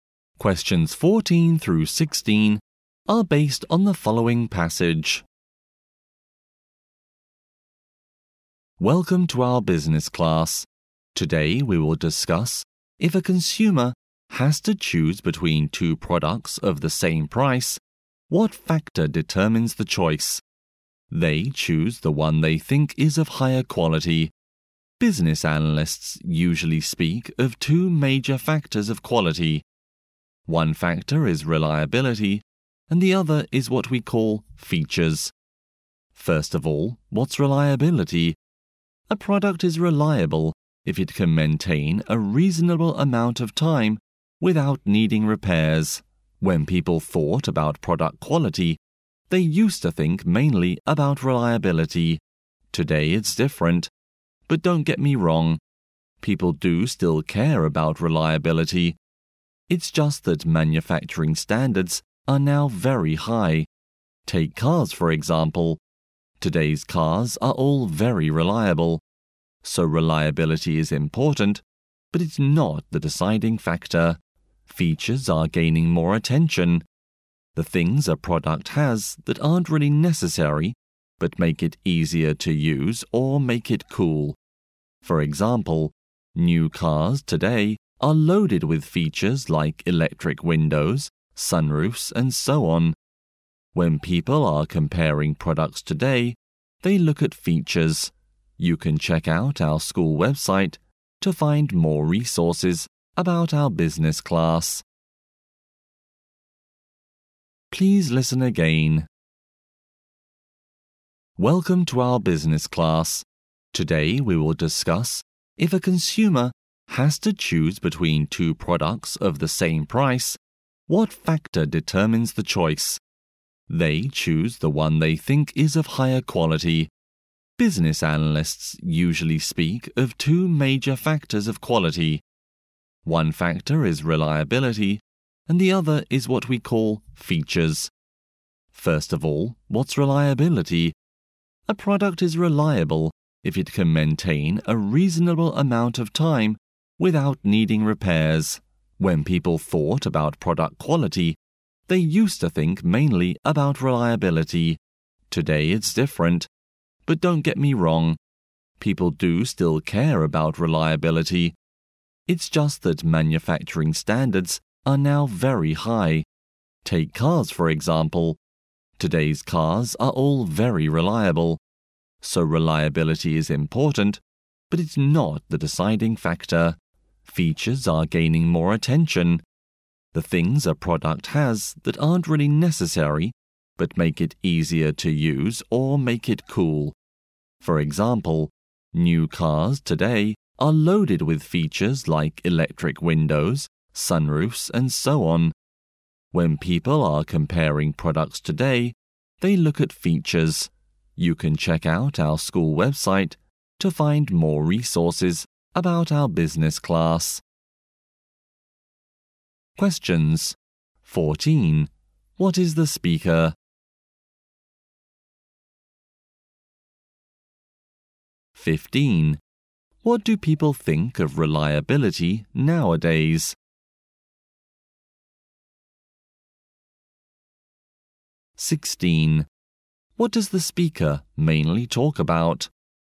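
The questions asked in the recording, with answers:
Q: What is the speaker?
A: A business teacher

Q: What do people think of reliability nowadays?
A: It is important but not the deciding factor

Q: What does the speaker mainly talk about?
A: Factors of product quality that determine consumers' choices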